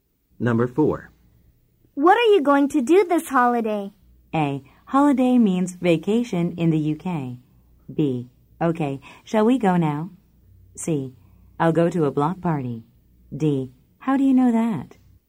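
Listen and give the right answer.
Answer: C: I'll go to a block party.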